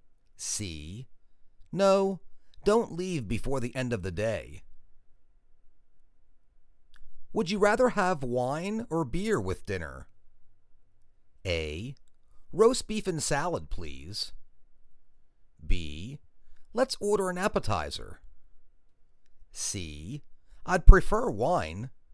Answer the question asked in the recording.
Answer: I'd prefer wine.